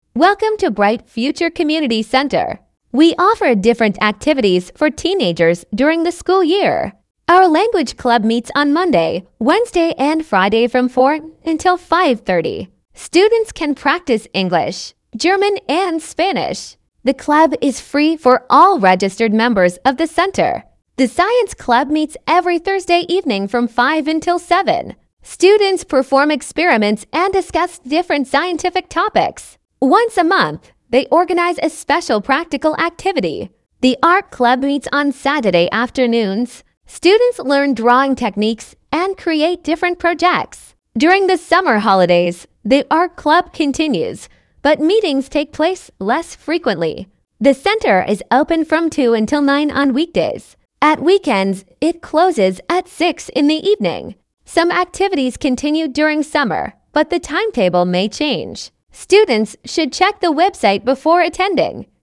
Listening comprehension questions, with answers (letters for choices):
Вы услышите сообщение. Для каждого предложения А–Е выберите один правильный вариант ответа из трёх предложенных (1, 2 или 3). Вы услышите запись дважды.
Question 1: Choose the TRUE sentence.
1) The language club meets three times a week.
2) The science club meets three times a week.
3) The art club meets only on Fridays.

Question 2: The language club is free for students who...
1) are members of the community centre.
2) bring their own textbooks.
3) are younger than twelve.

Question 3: The science club organises experiments...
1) every week.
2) once a month.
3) twice a year.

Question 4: On weekdays the centre closes at...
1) 7 p.m.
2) 8 p.m.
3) 9 p.m.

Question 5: During the summer holidays...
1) all clubs stop working.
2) some activities continue.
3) the centre closes completely.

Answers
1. 1
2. 1
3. 2
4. 3
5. 2

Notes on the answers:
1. Языковой клуб проходит три раза в неделю: в понедельник, среду и пятницу.
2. Клуб бесплатен для зарегистрированных участников центра.
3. Специальная практическая активность проводится один раз в месяц.
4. В будние дни центр работает до 21:00.
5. Некоторые занятия продолжаются летом, хотя расписание может измениться.

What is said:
Welcome to Bright Future Community Centre. We offer different activities for teenagers during the school year.
Our language club meets on Monday, Wednesday and Friday from four until five thirty. Students can practise English, German and Spanish. The club is free for all registered members of the centre.
The science club meets every Thursday evening from five until seven. Students perform experiments and discuss different scientific topics. Once a month, they organise a special practical activity.
The art club meets on Saturday afternoons. Students learn drawing techniques and create different projects. During the summer holidays, the art club continues, but meetings take place less frequently.
The centre is open from two until nine on weekdays. At weekends, it closes at six in the evening.
Some activities continue during summer, but the timetable may change. Students should check the website before attending.

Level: 8kl